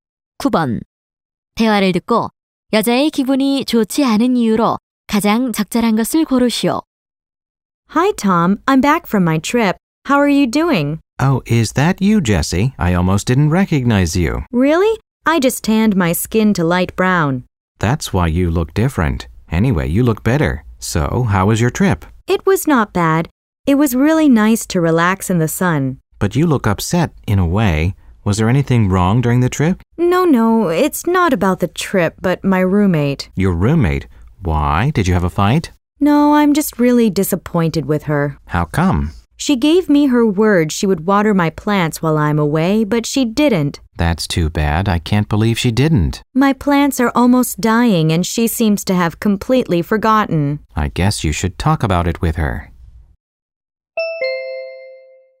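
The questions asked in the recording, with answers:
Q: 대화를 듣고 여자의 기분이 좋지 않은 이유로 가장 적절한 것을 고르시오.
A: 룸메이트가 식물에 물을 주겠다는 약속을 지키지 않아서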